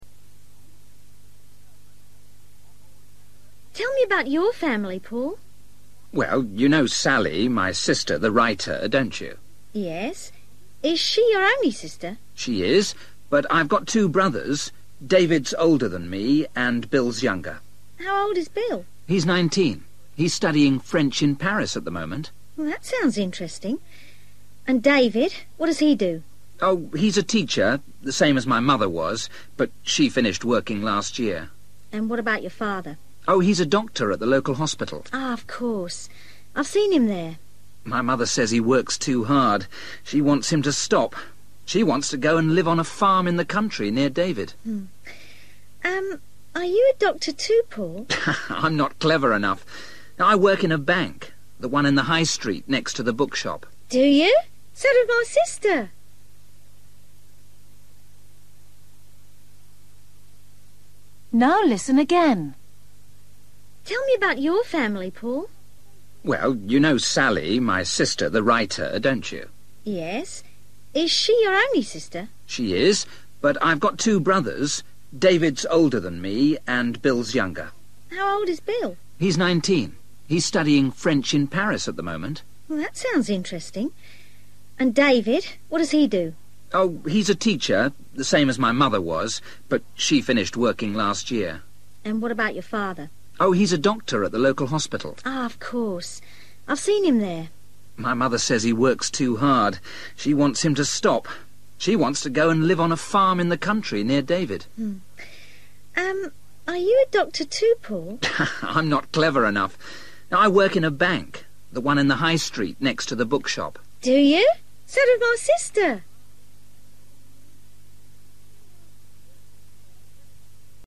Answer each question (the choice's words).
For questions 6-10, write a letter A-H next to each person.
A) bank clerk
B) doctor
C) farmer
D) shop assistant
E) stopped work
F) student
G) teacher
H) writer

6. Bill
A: student

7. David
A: teacher

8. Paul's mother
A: stopped work

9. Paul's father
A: doctor

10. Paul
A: bank clerk

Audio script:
Female: Tell me about your family, Paul.
Paul: Well, you know Sally, my sister – the writer – don't you?
Female: Yes. Is she your only sister?
Paul: She is. But I've got two brothers. David's older than me, and Bill's younger.
Female: How old is Bill?
Paul: He's nineteen. He's studying French in Paris at the moment.
Female: That sounds interesting ... And David? What does he do?
Paul: Oh, he's a teacher, the same as my mother was. But she finished working last year.
Female: And what about your father?
Paul: Oh, he's a doctor at the local hospital.
Female: Of course. I've seen him there.
Paul: My mother says he works too hard. She wants him to stop. She wants to go and live on a farm in the country, near David.
Female: Um ... Are you a doctor too, Paul?
Paul: I'm not clever enough! I work in a bank – the one in the High Street, next to the bookshop.
Female: Do you? So does my sister!

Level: A2